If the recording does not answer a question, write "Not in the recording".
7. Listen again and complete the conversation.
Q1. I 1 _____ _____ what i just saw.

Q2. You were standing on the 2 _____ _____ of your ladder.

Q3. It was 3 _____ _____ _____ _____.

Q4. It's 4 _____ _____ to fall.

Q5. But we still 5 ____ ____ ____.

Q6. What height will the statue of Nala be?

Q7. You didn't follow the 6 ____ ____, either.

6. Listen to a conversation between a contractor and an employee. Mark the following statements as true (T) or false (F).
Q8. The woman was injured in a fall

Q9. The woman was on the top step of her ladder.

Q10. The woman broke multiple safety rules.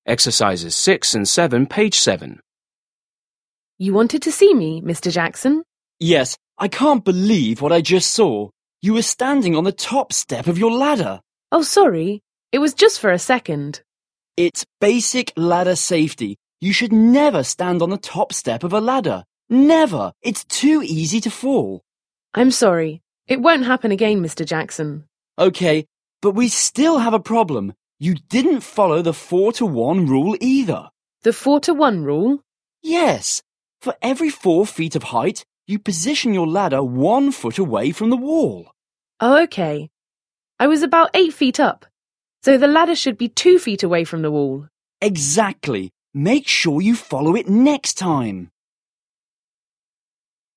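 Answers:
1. can't believe
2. top step
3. just for a second
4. too easy
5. have a problem
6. Not in the recording
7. 4:1 rule
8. F
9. T
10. T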